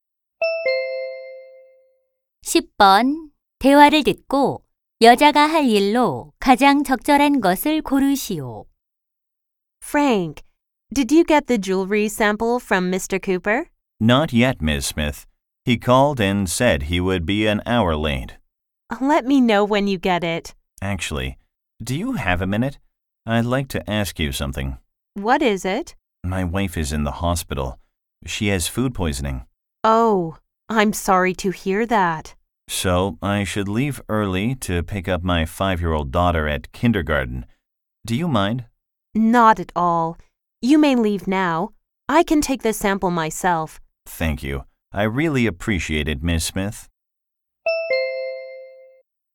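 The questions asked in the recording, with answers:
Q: 대화를 듣고 여자가 할 일로 가장 적절한 것을 고르시오.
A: 보석 샘플 직접 받기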